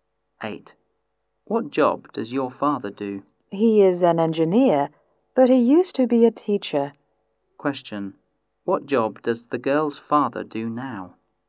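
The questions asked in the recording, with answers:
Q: What job does the girl's father do now?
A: He is an engineer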